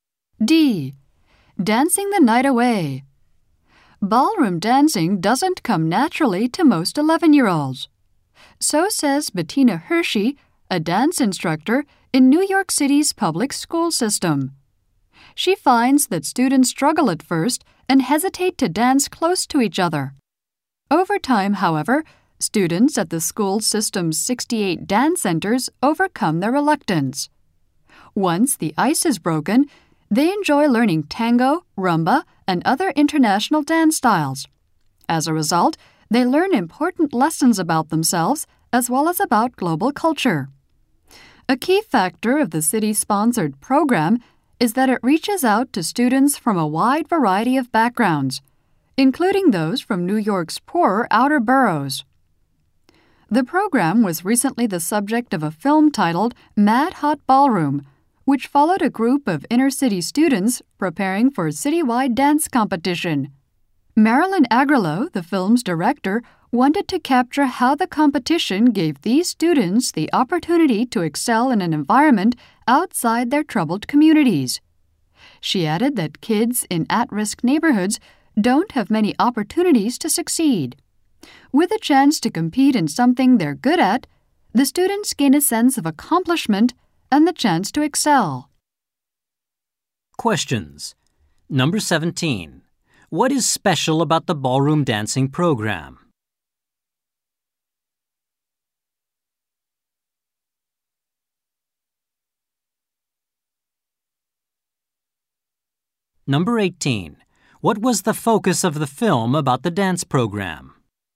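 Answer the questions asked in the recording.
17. It reaches students from many backgrounds, including poorer boroughs
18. How the competition let inner-city students excel outside their troubled communities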